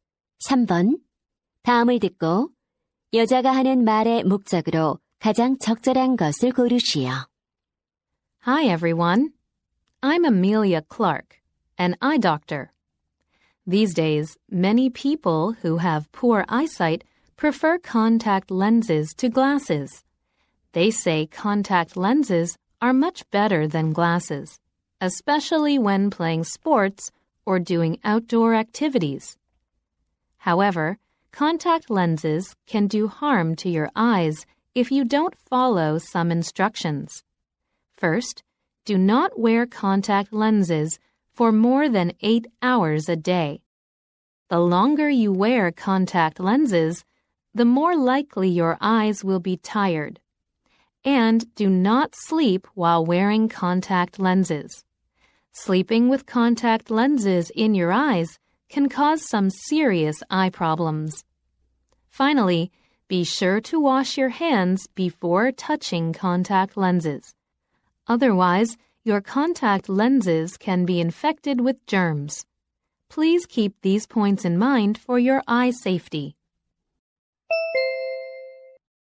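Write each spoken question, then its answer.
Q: 다음을 듣고 여자가 하는 말의 목적으로 가장 적절한 것을 고르시오.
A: 콘택트렌즈의 안전한 사용 수칙을 안내하려고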